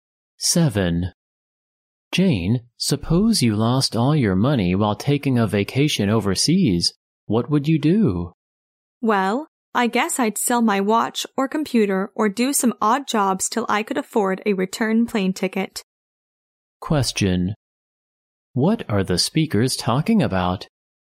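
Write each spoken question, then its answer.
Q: What are the speakers talking about?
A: What to do if you lost all your money on a vacation overseas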